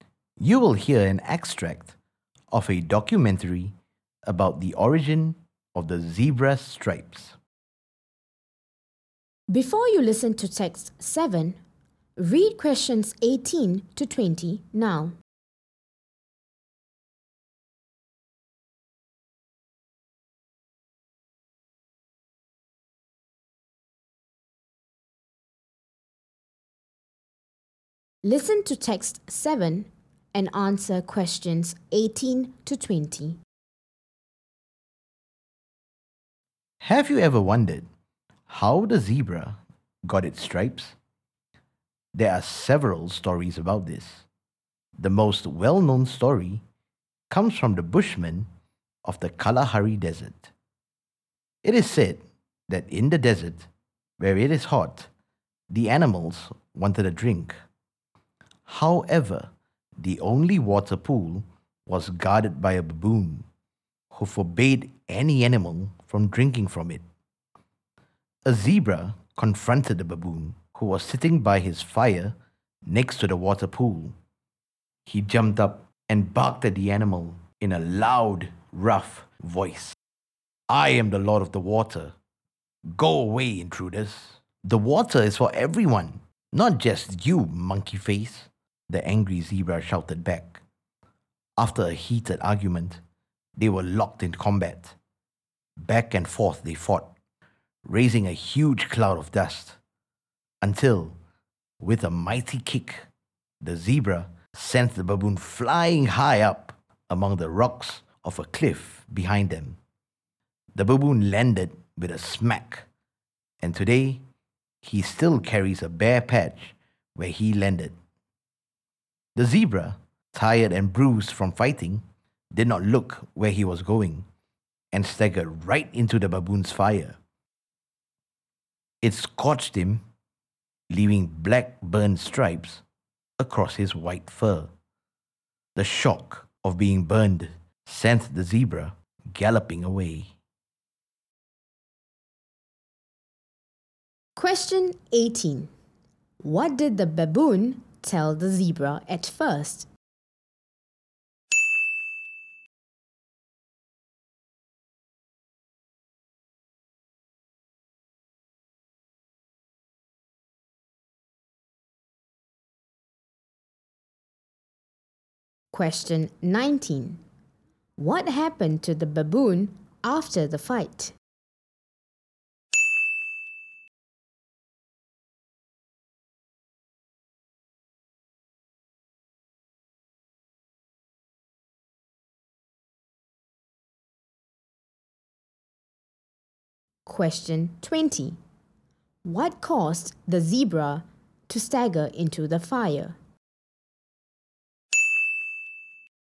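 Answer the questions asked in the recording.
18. He was the lord of the water and told the zebra to go away
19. He was kicked onto the rocks of a cliff and got a bare patch where he landed
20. He was tired and bruised from fighting and did not look where he was going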